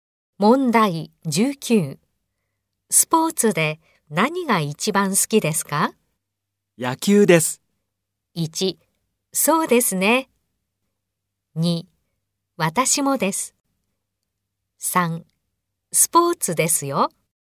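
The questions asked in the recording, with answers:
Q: スポーツで何が一番好きですか?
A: 2: 私もです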